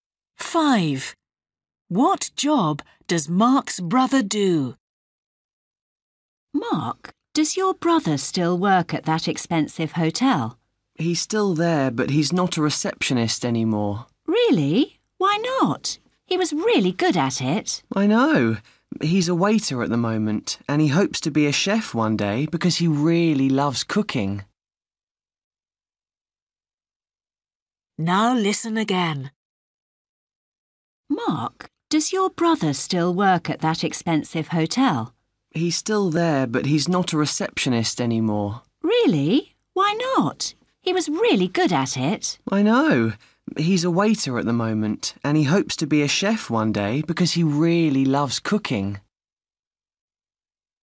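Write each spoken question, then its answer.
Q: What job does Mark's brother do?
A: Waiter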